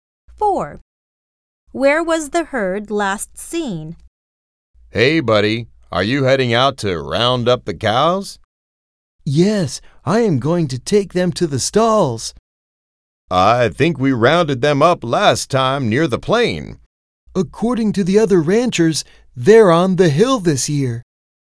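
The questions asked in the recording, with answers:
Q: Where was the herd last seen?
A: On the hill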